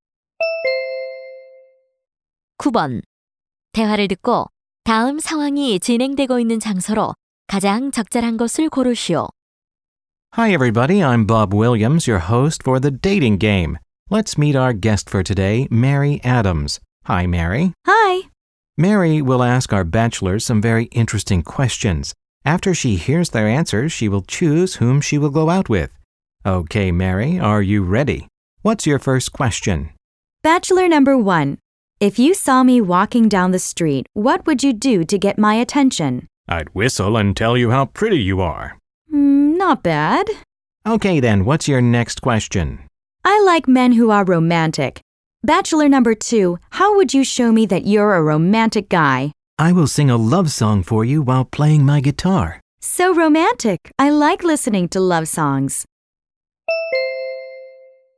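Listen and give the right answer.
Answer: TV 데이트 게임 쇼 방송 스튜디오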